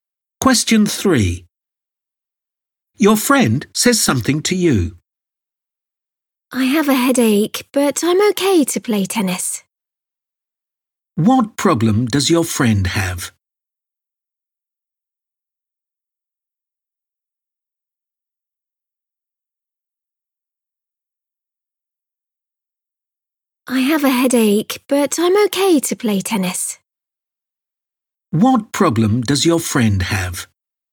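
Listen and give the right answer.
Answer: a headache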